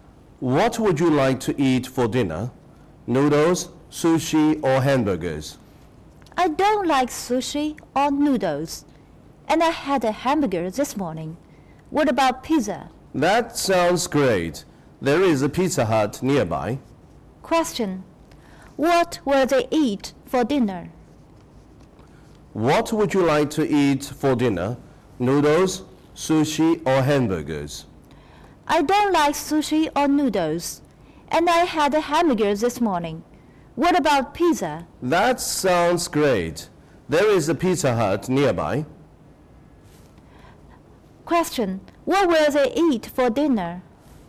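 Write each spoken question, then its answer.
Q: What will they eat for dinner?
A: Pizza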